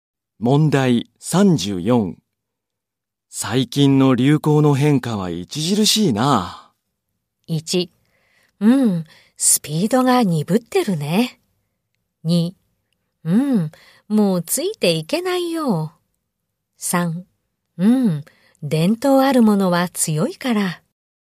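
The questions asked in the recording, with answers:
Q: 最近の流行の変化は著しいな。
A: 2: うん、もうついていけないよ。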